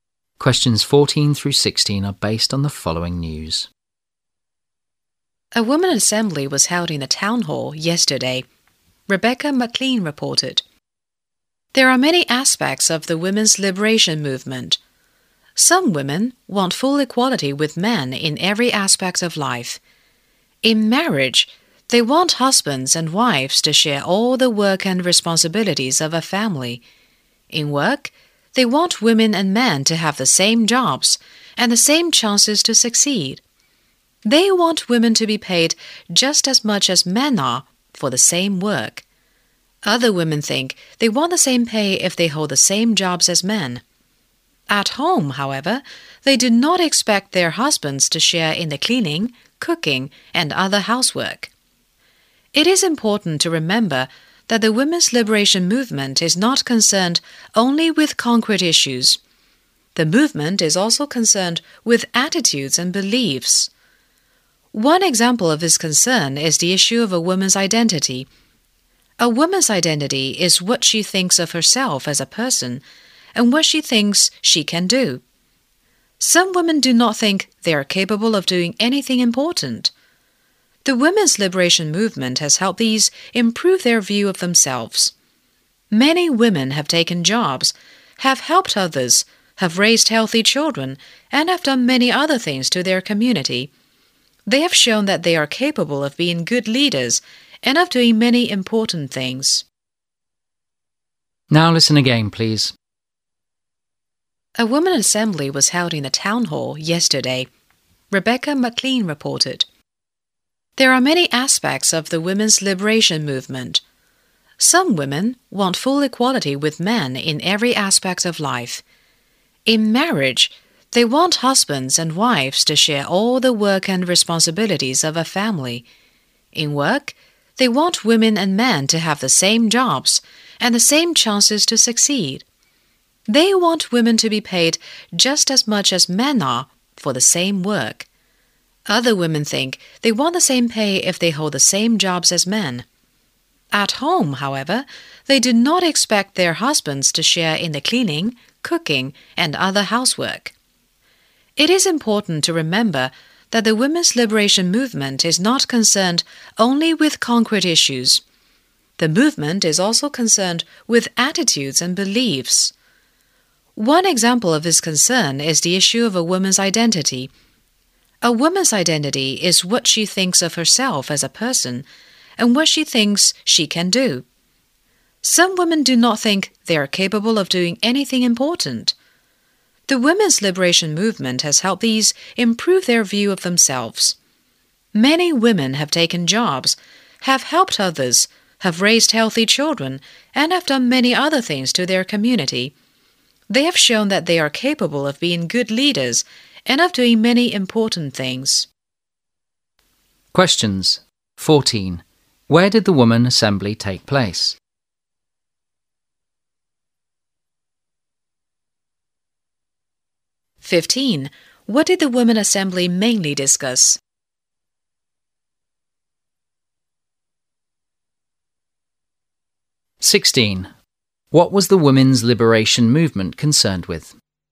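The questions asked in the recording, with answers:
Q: Where did the woman assembly take place?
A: In the town hall

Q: What did the women assembly mainly discuss?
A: The women's liberation movement

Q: What was the women's liberation movement concerned with?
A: Concrete issues as well as attitudes and beliefs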